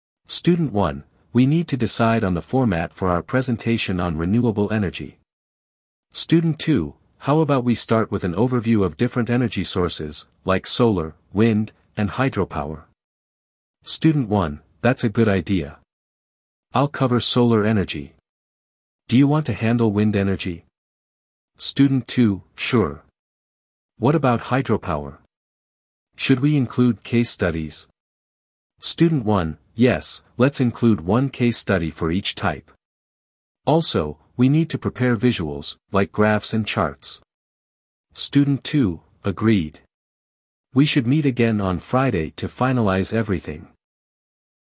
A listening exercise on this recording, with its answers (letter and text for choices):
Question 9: What topic is the group project about?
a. Climate change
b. Renewable energy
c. Fossil fuels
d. Environmental policies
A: b. Renewable energy